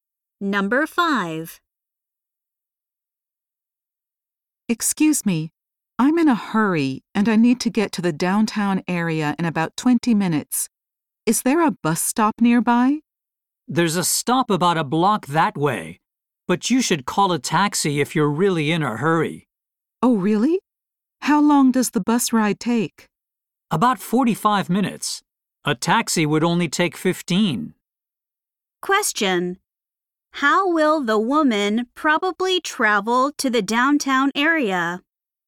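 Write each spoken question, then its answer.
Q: How will the woman probably travel to the downtown area?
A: By taxi.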